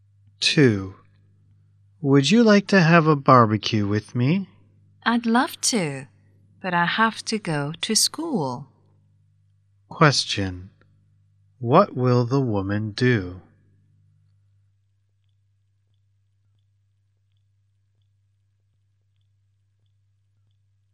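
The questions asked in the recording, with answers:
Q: What will the woman do?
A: Go to school.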